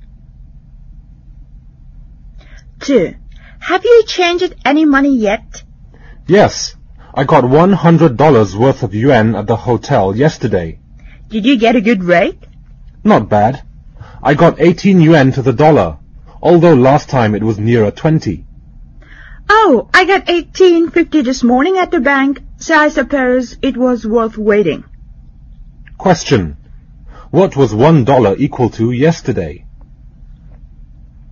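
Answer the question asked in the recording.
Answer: 18 yuan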